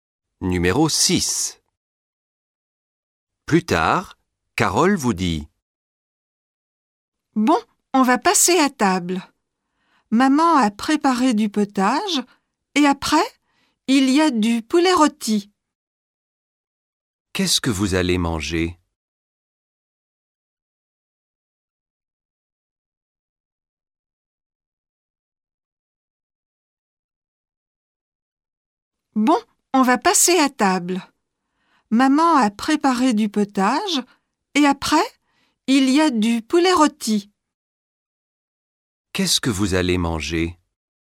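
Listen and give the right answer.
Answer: du potage et du poulet rôti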